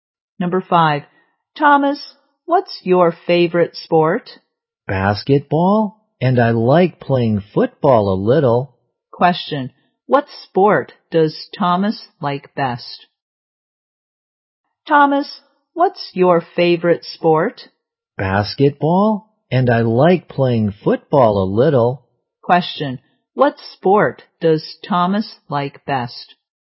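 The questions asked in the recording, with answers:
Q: Question, what sport does Thomas like best?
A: Basketball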